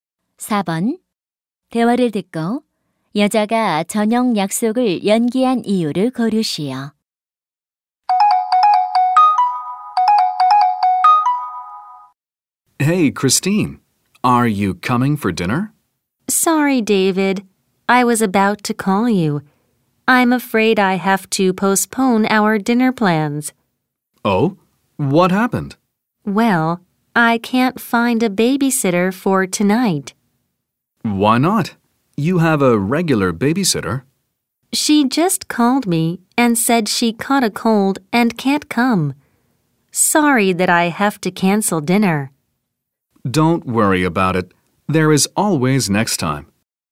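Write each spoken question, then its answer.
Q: 대화를 듣고 여자가 저녁 약속을 연기한 이유를 고르시오.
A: 베이비시터가 감기에 걸려 올 수 없어서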